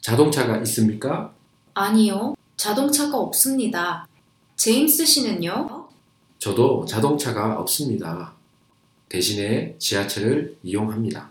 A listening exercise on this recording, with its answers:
1. 대화를 듣고 빈 칸을 채우십시오. Listen to the dialogue and fill in the blanks.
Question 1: 남자와 여자는 가 없습니다.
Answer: 자동차

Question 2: 남자는 을 이용합니다.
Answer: 지하철